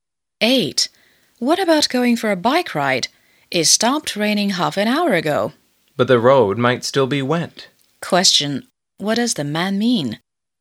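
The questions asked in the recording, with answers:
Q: What does the man mean?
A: It's not a good time for a bike ride because the road may still be wet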